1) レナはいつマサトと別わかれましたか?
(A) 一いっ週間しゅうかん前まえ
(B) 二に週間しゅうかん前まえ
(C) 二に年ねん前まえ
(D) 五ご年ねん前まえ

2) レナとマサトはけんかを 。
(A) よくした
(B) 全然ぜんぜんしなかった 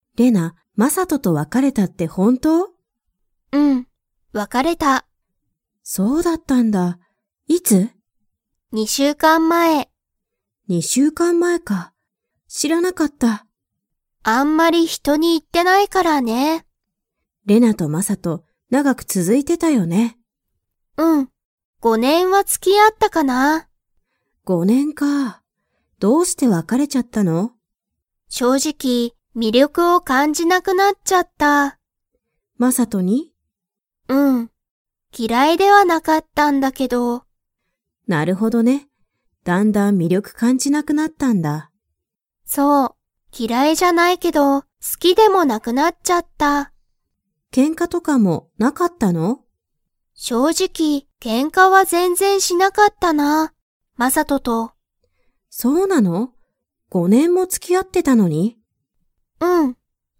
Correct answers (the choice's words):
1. 二に週間しゅうかん前まえ
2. 全然ぜんぜんしなかった

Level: Level 4